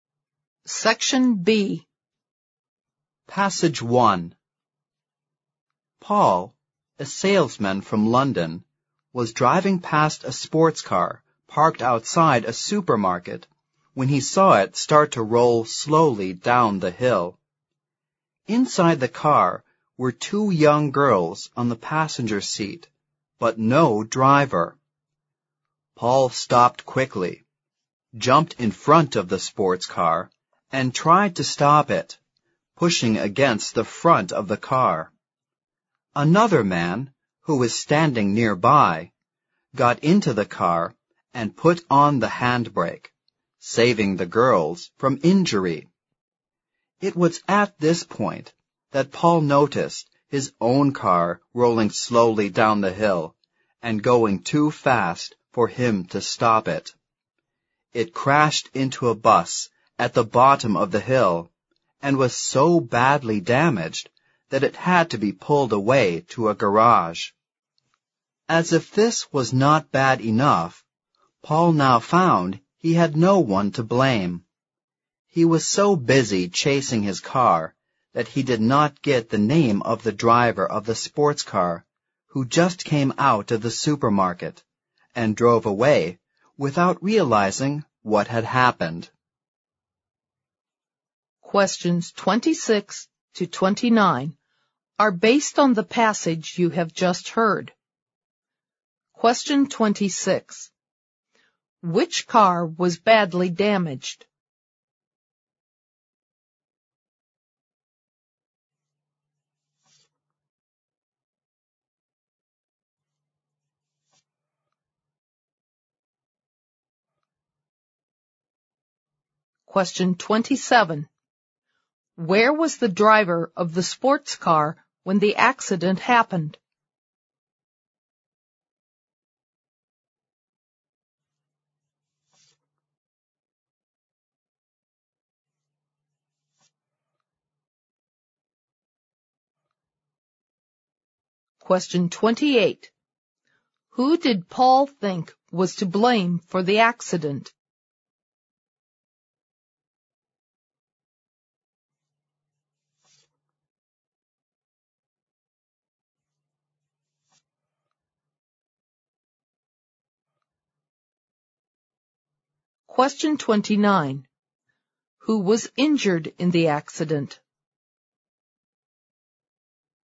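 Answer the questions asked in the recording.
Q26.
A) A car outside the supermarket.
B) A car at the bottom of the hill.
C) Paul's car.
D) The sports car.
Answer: C) Paul's car.
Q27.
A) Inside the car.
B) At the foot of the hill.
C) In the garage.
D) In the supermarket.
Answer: D) In the supermarket.
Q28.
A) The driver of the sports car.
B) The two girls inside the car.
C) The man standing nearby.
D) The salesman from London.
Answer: A) The driver of the sports car.
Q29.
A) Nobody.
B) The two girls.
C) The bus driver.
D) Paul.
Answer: A) Nobody.

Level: 新编四级听力练习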